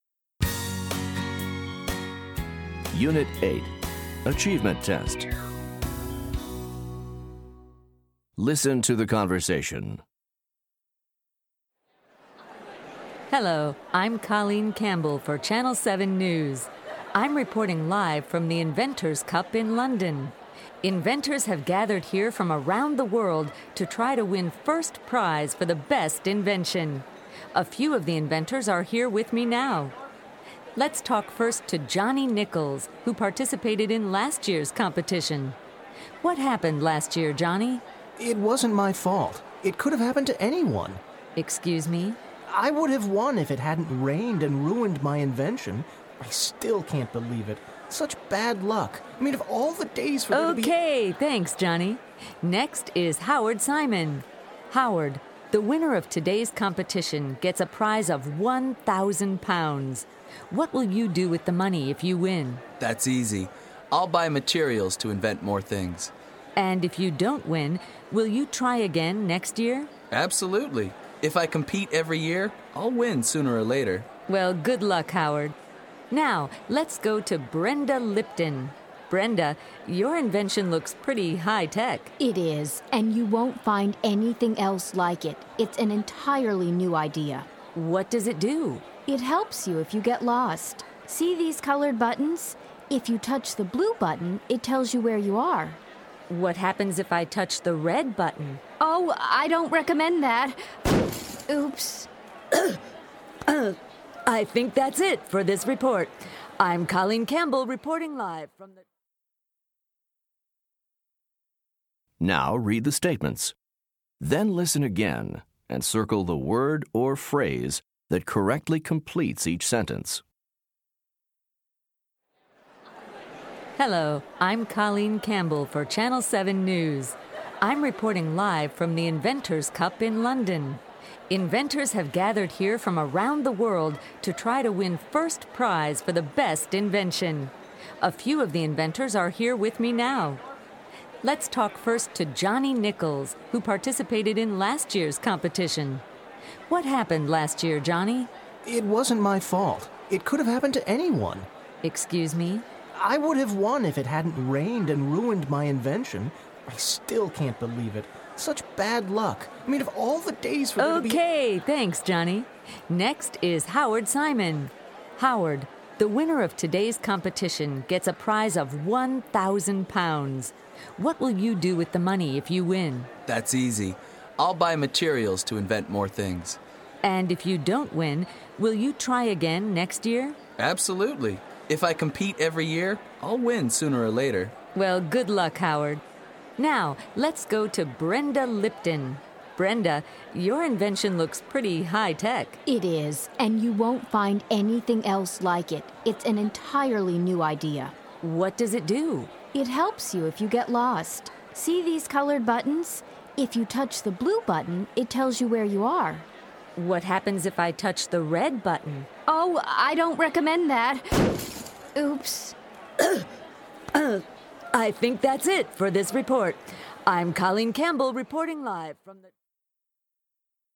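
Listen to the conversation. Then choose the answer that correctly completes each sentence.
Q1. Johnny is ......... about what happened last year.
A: upset

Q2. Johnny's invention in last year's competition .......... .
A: was ruined by the rain

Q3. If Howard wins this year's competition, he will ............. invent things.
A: buy materials to

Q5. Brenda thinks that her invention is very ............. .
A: unique

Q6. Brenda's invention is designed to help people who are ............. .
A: lost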